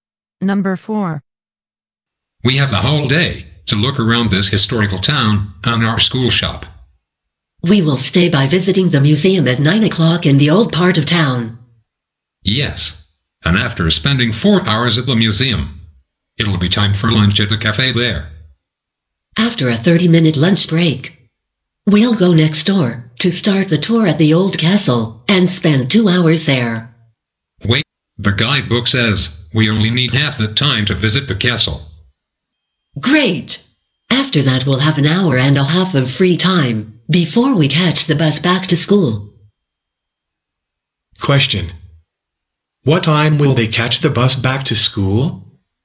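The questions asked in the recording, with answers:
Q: What time will they catch the bus back to school?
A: 4 p.m.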